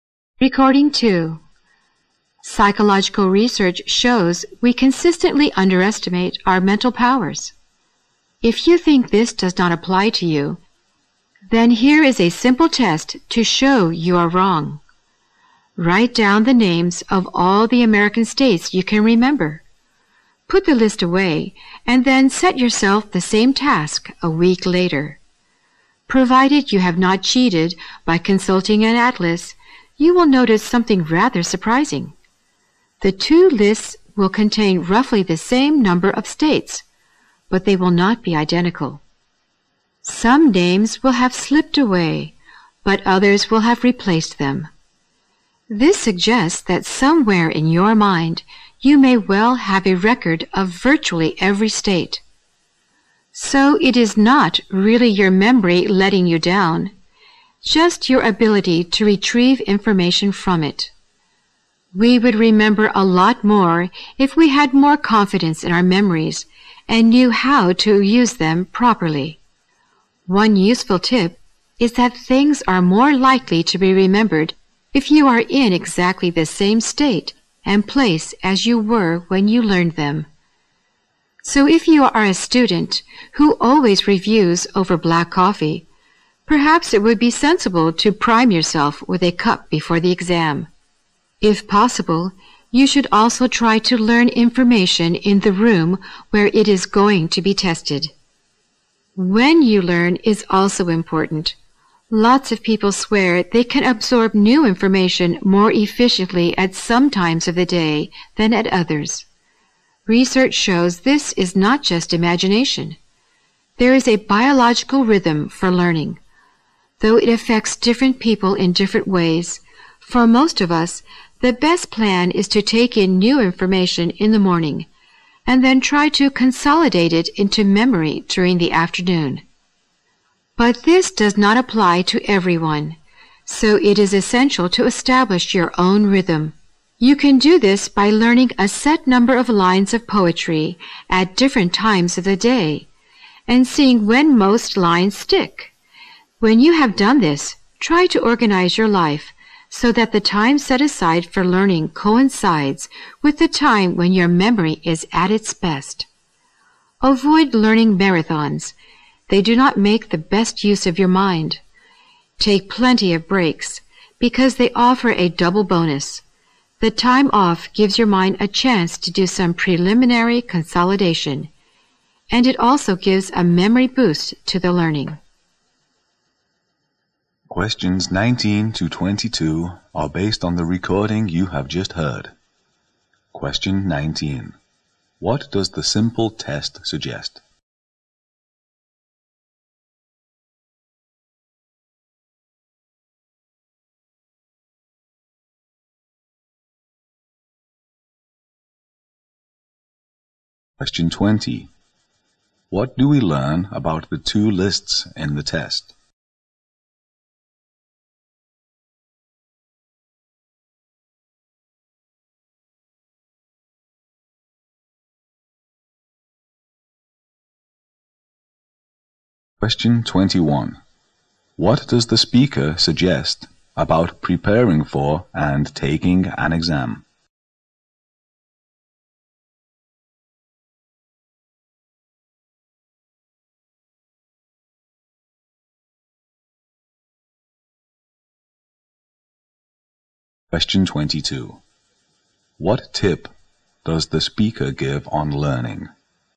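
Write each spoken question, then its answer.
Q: What does the simple test suggest?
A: We underestimate our memory; the problem is retrieving information

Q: What do we learn about the two lists in the test?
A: They have about the same number of states but are not identical

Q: What does the speaker suggest about preparing for and taking an exam?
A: Be in the same state and place as when you learned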